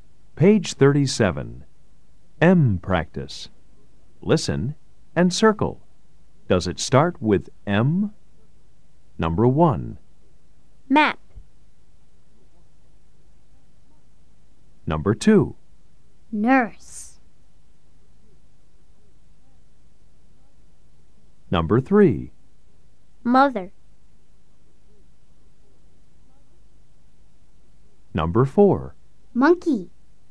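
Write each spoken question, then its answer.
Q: Does it start with M? Number 1. Map.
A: Yes

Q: Number 2. Nurse.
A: No

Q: Number 3. Mother.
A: Yes

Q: Number 4. Monkey.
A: Yes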